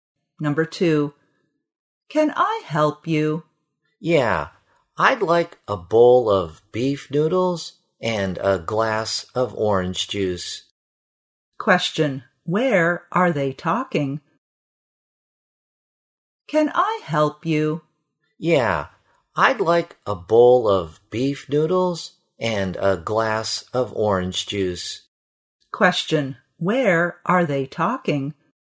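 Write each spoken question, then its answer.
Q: where are they talking?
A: In a restaurant.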